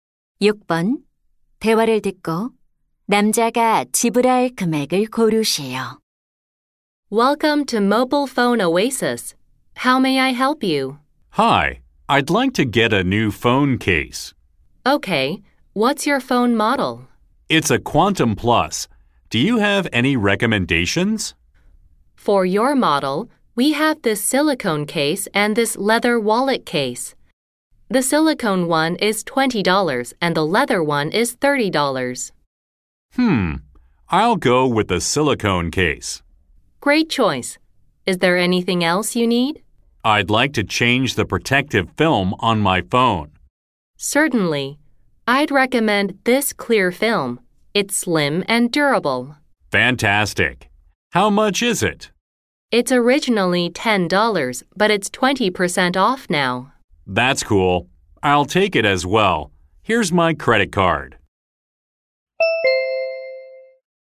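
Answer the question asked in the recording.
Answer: $28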